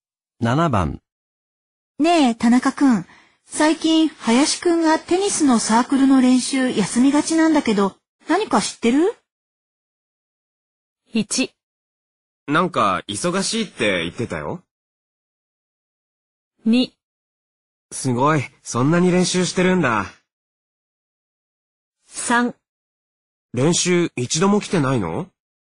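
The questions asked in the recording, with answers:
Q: ねえ、田中くん。最近、林くんがテニスのサークルの練習休みがちなんだけど、何か知ってる?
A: 1: なんか、忙しいって言ってたよ。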